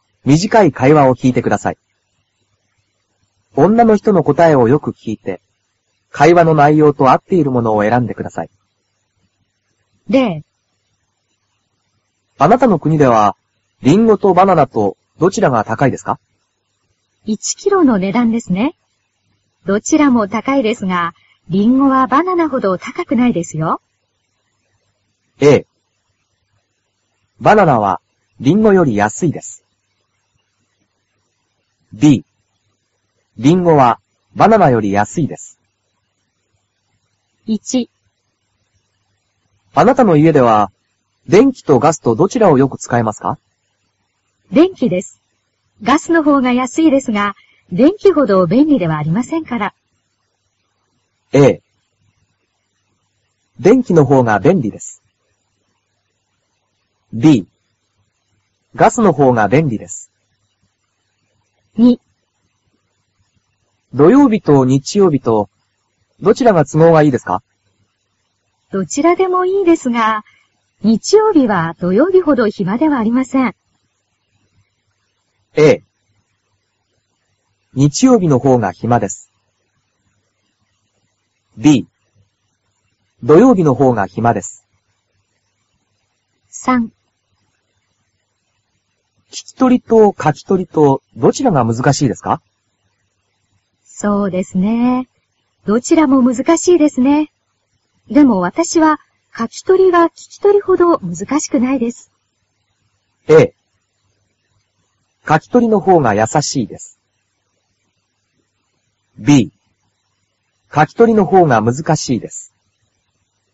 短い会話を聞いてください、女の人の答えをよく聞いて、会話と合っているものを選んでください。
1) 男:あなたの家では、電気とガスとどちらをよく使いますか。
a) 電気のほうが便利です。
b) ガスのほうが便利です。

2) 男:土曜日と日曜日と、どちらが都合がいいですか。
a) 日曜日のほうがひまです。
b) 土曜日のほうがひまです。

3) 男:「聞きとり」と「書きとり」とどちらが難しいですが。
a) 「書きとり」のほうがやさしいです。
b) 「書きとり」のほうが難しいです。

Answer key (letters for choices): 1a, 2b, 3a

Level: cơ bản